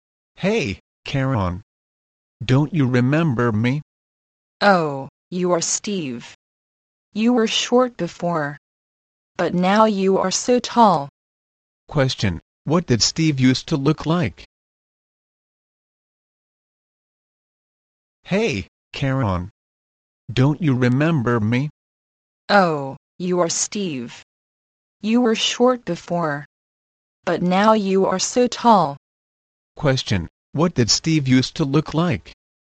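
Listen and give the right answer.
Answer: Short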